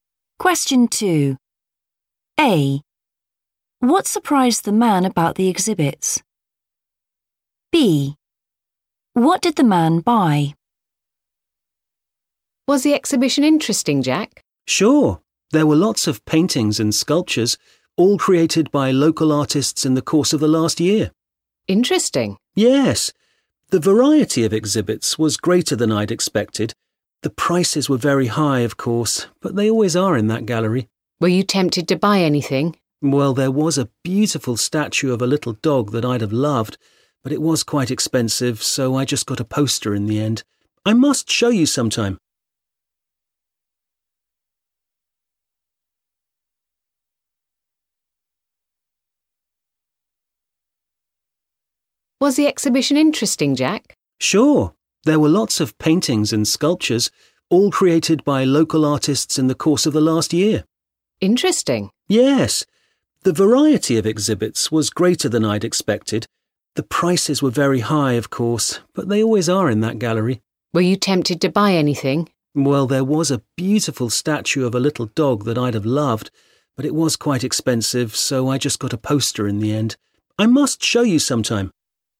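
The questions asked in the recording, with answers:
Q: What surprised the man about the exhibits?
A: their variety

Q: What did the man buy?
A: a poster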